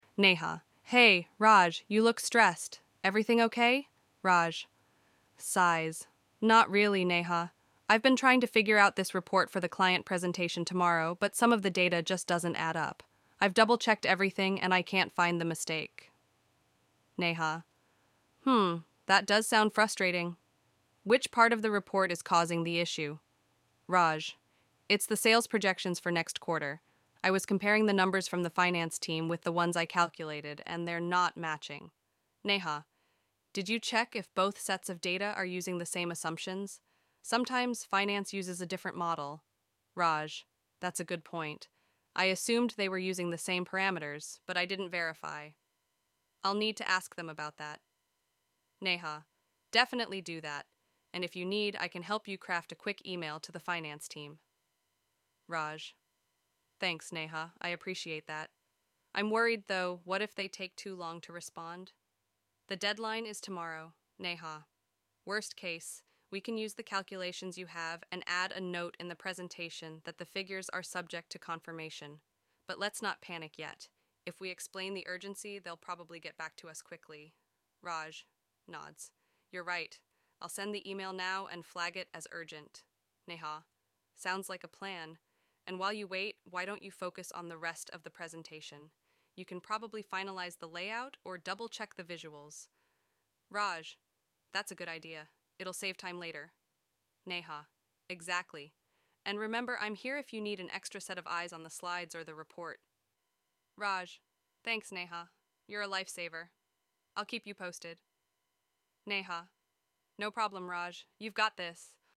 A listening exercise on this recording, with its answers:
Questions 1 to 8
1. What is Raj's main problem in the conversation?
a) He cannot complete the visuals for the presentation.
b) He is unsure about the sales projections matching with the finance data.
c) He is late for a client meeting.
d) He doesn't have the client's feedback.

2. What does Neha suggest might be causing the mismatch in the data?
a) Incorrect client information.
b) Different calculation models used by the finance team.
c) A software error in the reporting system.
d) Missing sections in the report.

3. What is Raj worried about regarding the finance team?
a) They might not understand his question.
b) They might not respond quickly enough.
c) They might provide incorrect data.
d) They might refuse to help him.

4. What solution does Neha propose if the finance team takes too long to respond?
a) Skip the projections entirely in the presentation.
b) Use the current calculations with a note about confirmation.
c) Postpone the client presentation.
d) Replace the finance data with estimates.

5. What task does Neha recommend Raj focus on while waiting for the finance team's response?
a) Correcting the calculations.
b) Crafting another email to the finance team.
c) Finalizing the layout and visuals of the presentation.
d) Taking a break to relax.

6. How does Neha offer to help Raj?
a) By rechecking the sales calculations herself.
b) By drafting the email to the finance team with him.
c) By presenting the report to the client.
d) By discussing the issue directly with the finance team.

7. What tone does Neha use throughout the conversation?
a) Critical and impatient.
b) Supportive and encouraging.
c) Indifferent and formal.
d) Overly casual and dismissive.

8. How does the conversation conclude?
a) Raj decides to postpone the presentation.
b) Raj sends an email to the finance team and works on other parts of the presentation.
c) Neha takes over Raj's responsibility for the presentation.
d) Raj abandons the task and leaves it incomplete.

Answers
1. b
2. b
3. b
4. b
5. c
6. b
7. b
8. b

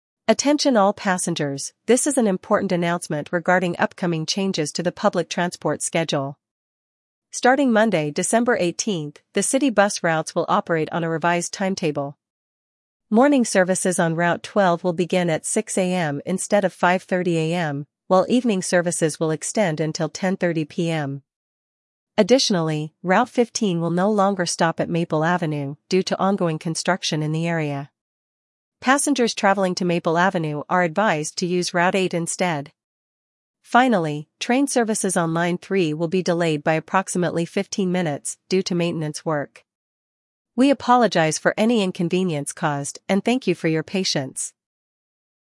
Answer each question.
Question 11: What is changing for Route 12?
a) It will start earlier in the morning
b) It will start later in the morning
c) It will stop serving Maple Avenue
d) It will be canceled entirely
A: b

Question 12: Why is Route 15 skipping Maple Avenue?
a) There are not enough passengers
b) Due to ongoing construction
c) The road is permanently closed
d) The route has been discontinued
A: b

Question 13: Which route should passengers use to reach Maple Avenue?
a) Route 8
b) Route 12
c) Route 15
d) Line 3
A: a

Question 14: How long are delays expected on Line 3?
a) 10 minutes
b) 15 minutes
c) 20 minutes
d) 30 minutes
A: b

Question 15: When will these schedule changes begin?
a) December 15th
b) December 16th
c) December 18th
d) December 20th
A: c

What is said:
Attention all passengers, this is an important announcement regarding upcoming changes to the public transport schedule. Starting Monday, December 18th, the city bus routes will operate on a revised timetable. Morning services on Route 12 will begin at 6:00 AM instead of 5:30 AM, while evening services will extend until 10:30 PM.
Additionally, Route 15 will no longer stop at Maple Avenue due to ongoing construction in the area. Passengers traveling to Maple Avenue are advised to use Route 8 instead. Finally, train services on Line 3 will be delayed by approximately 15 minutes due to maintenance work. We apologize for any inconvenience caused and thank you for your patience.

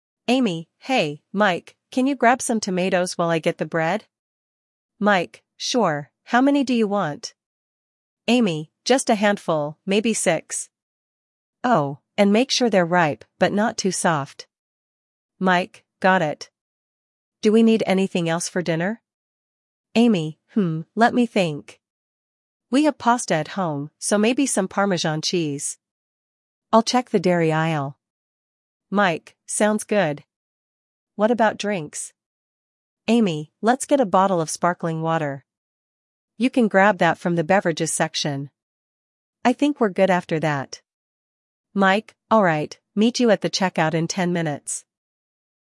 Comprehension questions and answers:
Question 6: What does Amy ask Mike to buy first?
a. Bread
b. Tomatoes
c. Parmesan cheese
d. Sparkling water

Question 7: What quality does Amy want in the tomatoes?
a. Ripe and firm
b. Ripe but not too soft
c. Unripe and hard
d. Overripe and soft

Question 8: What meal are Amy and Mike likely planning to prepare?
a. Pizza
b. Pasta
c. Salad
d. Soup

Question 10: Where do Amy and Mike plan to meet after shopping?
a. In the bakery section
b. At the entrance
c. At the checkout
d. Near the pasta aisle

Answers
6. b
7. b
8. b
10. c

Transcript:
Amy: Hey, Mike, can you grab some tomatoes while I get the bread?
Mike: Sure, how many do you want?
Amy: Just a handful, maybe six. Oh, and make sure they're ripe but not too soft.
Mike: Got it. Do we need anything else for dinner?
Amy: Hmm, let me think. We have pasta at home, so maybe some parmesan cheese. I'll check the dairy aisle.
Mike: Sounds good. What about drinks?
Amy: Let's get a bottle of sparkling water. You can grab that from the beverages section. I think we're good after that.
Mike: Alright, meet you at the checkout in 10 minutes.

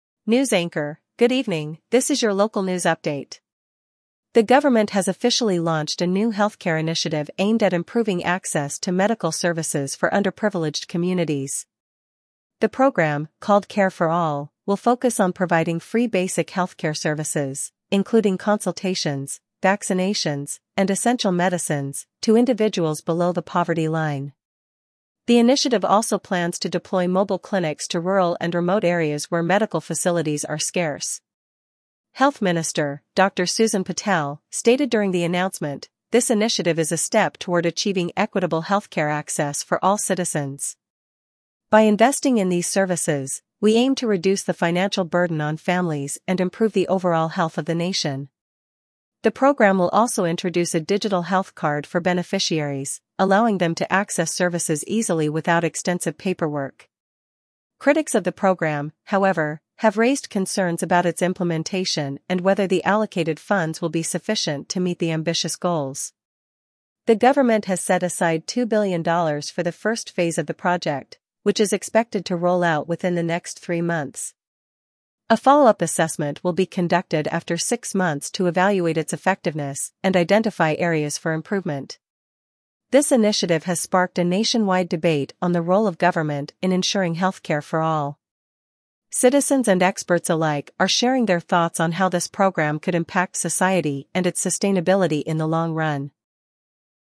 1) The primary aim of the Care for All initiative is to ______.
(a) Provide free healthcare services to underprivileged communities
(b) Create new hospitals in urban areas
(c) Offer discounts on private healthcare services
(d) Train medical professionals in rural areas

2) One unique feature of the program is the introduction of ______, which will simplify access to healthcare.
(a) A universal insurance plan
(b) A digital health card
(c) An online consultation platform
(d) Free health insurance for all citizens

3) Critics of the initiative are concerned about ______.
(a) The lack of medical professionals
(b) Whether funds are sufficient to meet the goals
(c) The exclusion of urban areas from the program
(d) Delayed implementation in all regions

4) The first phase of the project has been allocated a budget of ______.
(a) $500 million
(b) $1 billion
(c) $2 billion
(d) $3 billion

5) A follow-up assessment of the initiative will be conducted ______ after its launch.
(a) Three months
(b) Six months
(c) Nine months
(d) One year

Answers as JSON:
{"1": "a", "2": "b", "3": "b", "4": "c", "5": "b"}

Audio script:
News Anchor: Good evening, this is your local news update. The government has officially launched a new healthcare initiative aimed at improving access to medical services for underprivileged communities.
The program, called Care for All, will focus on providing free basic healthcare services, including consultations, vaccinations, and essential medicines, to individuals below the poverty line. The initiative also plans to deploy mobile clinics to rural and remote areas where medical facilities are scarce.
Health Minister, Dr. Susan Patel, stated during the announcement, "This initiative is a step toward achieving equitable healthcare access for all citizens. By investing in these services, we aim to reduce the financial burden on families and improve the overall health of the nation."
The program will also introduce a digital health card for beneficiaries, allowing them to access services easily without extensive paperwork. Critics of the program, however, have raised concerns about its implementation and whether the allocated funds will be sufficient to meet the ambitious goals.
The government has set aside $2 billion for the first phase of the project, which is expected to roll out within the next three months. A follow-up assessment will be conducted after six months to evaluate its effectiveness and identify areas for improvement.
This initiative has sparked a nationwide debate on the role of government in ensuring healthcare for all. Citizens and experts alike are sharing their thoughts on how this program could impact society and its sustainability in the long run.

